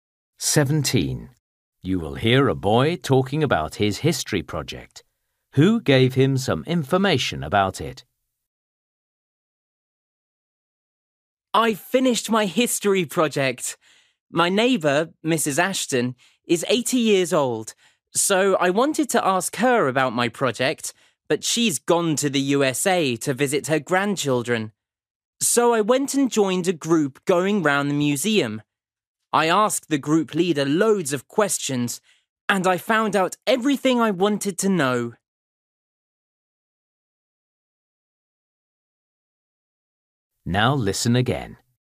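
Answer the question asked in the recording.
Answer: The group leader at the museum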